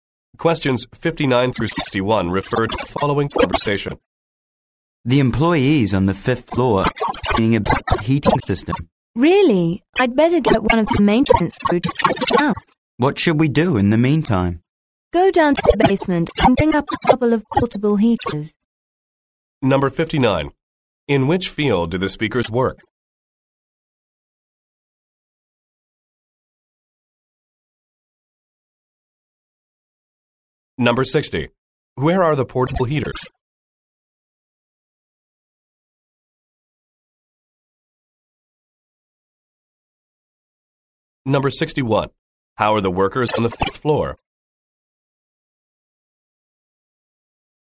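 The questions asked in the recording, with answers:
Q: Where are the portable heaters?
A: In the basement

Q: How are the workers on the fifth floor?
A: Cold; complaining about the heating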